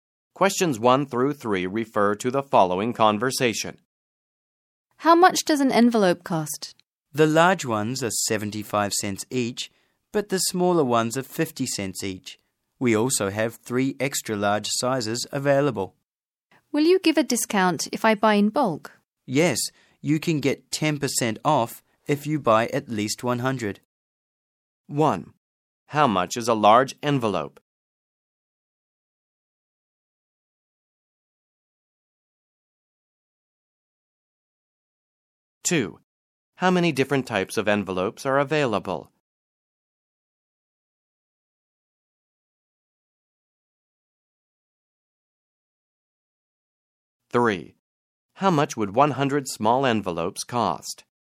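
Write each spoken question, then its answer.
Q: How much is a large envelope?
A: 75 cents

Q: How much would 100 small envelopes cost?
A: $45 (with 10% off)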